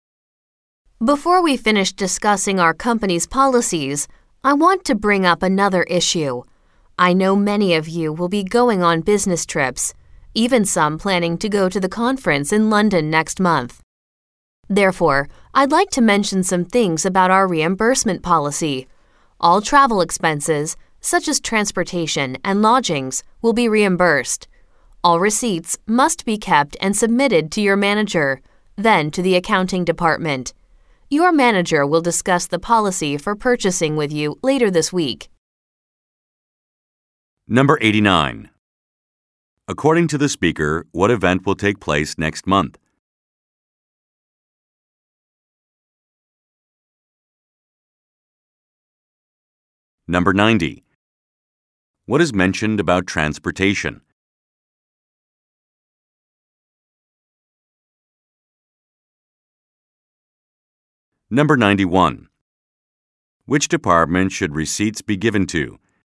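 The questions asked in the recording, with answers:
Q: According to the speaker, what event will take place next month?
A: A conference in London

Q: What is mentioned about transportation?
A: Transportation expenses will be reimbursed

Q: Which department should receipts be given to?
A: The accounting department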